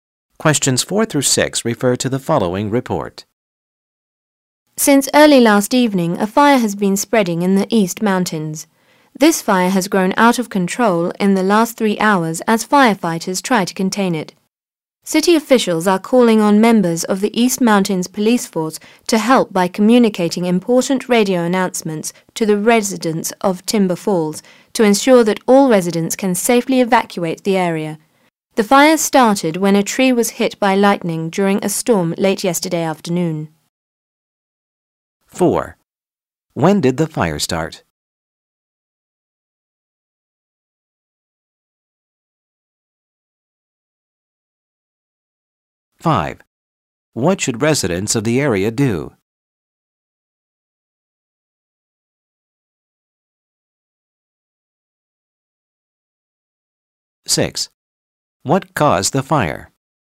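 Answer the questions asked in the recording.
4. Late yesterday afternoon
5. Evacuate the area safely
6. Lightning hit a tree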